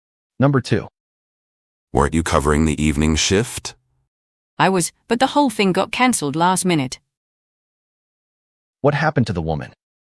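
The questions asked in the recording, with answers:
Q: What happened to the woman?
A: Her evening shift was cancelled at the last minute.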